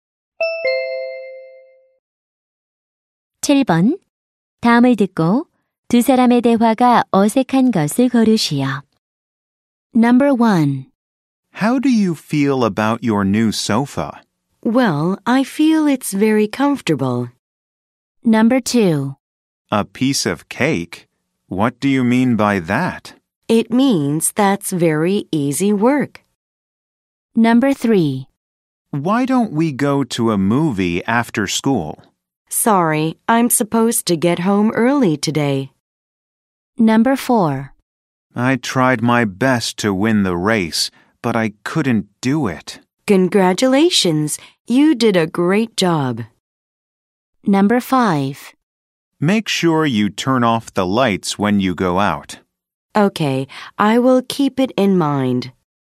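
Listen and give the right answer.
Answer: 4: I tried my best to win the race, but I couldn't do it. / Congratulations! You did a great job.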